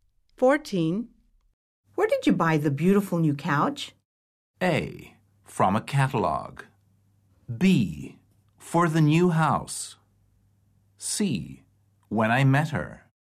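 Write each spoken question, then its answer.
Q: Where did you buy the beautiful new couch?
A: A: From a catalog.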